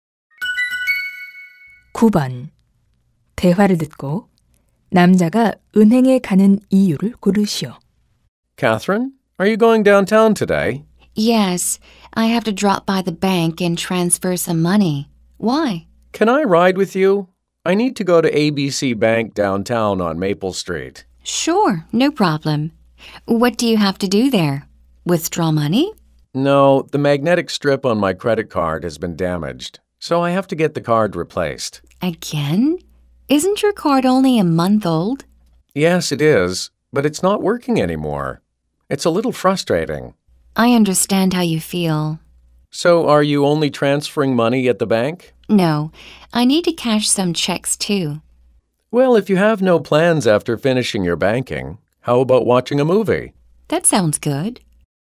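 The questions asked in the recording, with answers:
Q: 대화를 듣고 남자가 은행에 가는 이유를 고르시오.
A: 손상된 신용카드를 교체하려고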